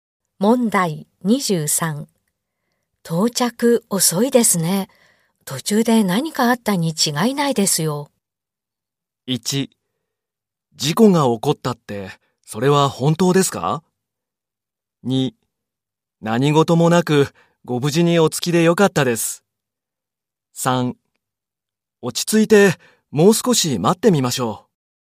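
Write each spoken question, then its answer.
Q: 到着遅いですね。途中で何かあったに違いないですよ。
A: 3: 落ち着いて、もう少し待ってみましょう。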